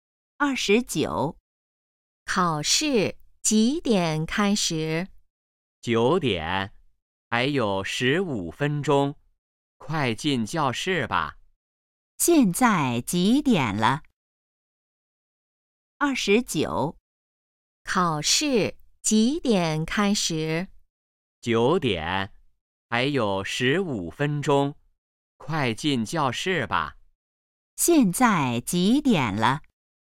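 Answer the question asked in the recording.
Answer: 8点45分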